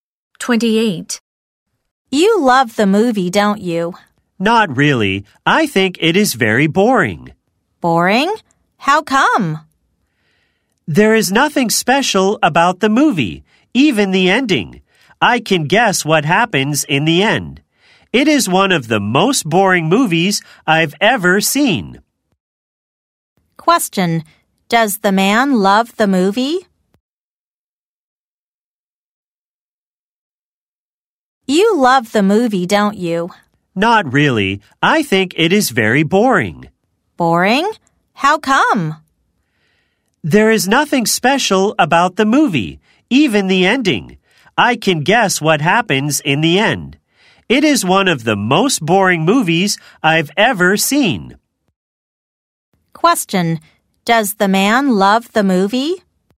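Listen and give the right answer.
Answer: No, he thinks it is boring.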